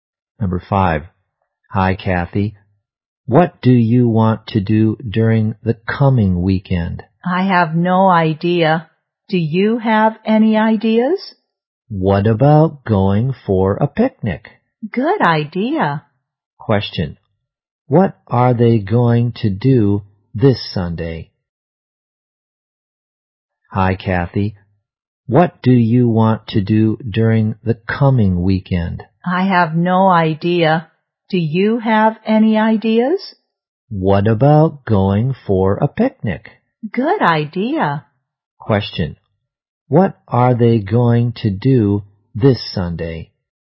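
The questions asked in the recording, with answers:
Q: What are they going to do this Sunday?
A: Go for a picnic.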